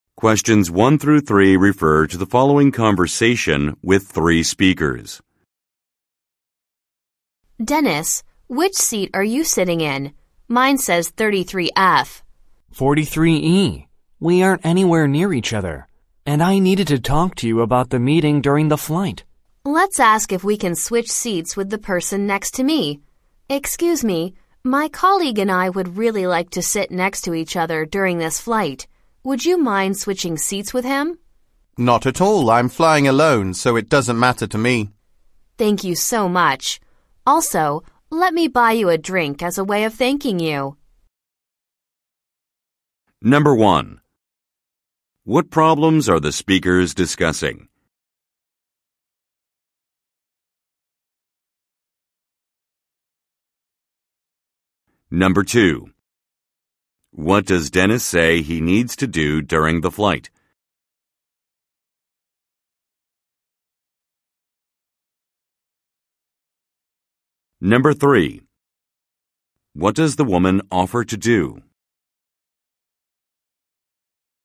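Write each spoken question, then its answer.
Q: What problems are the speakers discussing?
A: Their seats on the flight are not next to each other

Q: What does Dennis say he needs to do during the flight?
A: Talk about the meeting

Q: What does the woman offer to do?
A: Buy the passenger a drink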